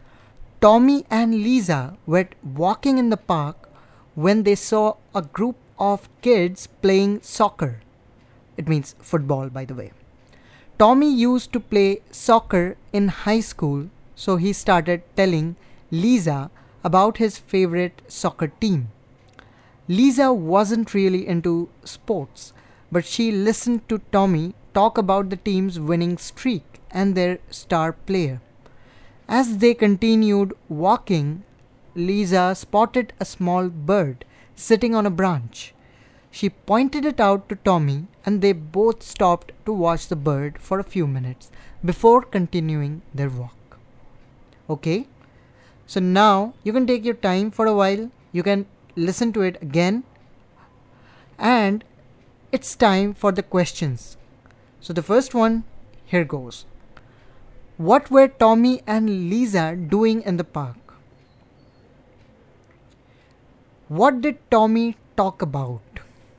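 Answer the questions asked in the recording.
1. Walking
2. His favorite soccer team
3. A small bird sitting on a branch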